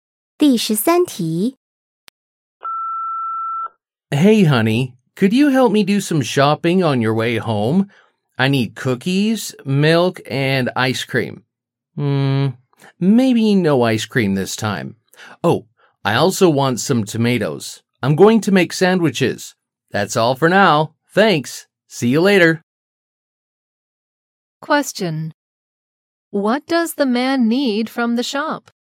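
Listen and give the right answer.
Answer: Cookies, milk and tomatoes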